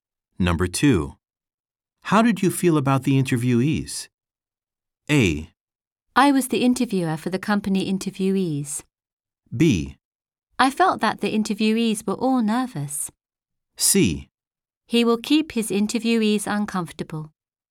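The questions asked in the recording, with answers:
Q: How did you feel about the interviewees?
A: B: I felt that the interviewees were all nervous.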